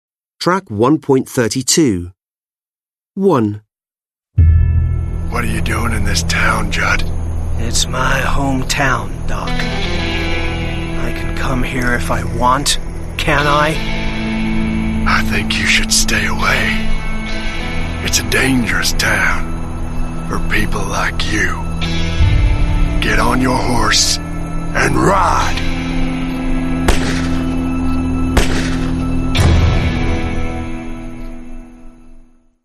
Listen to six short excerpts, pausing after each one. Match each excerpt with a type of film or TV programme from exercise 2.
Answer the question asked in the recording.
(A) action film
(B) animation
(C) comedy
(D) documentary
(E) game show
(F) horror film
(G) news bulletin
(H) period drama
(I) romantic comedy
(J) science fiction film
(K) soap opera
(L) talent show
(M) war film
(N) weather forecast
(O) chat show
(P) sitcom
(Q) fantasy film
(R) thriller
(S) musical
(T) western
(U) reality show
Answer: (T) western

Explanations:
Doc: What you doing in this town, Jud? Jud: It's my home town, Doc. I can come here if I want, can't I? Doc: I think you should stay away. It's a dangerous town – for people like you. Get on your horse and ride. (Gun sound)

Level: Lớp 10